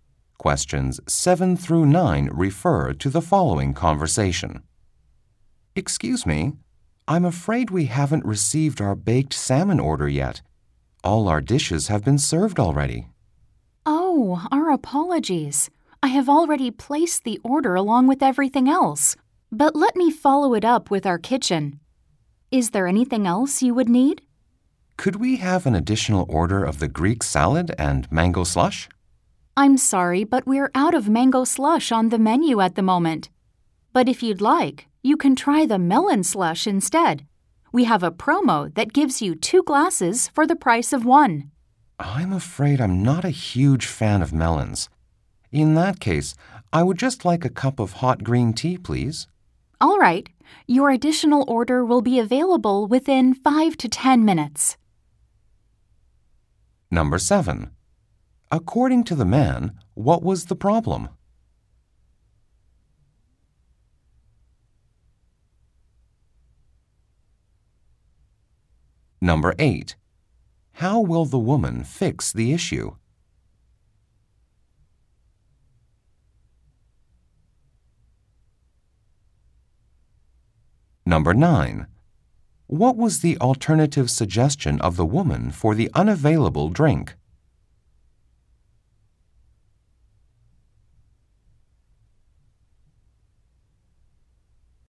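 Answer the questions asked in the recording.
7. Their baked salmon order had not been served yet
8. She will follow up the order with the kitchen
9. Melon slush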